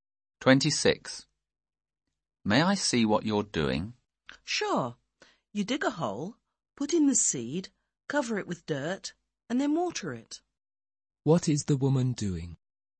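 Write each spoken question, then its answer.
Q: What is the woman doing?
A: Planting seeds.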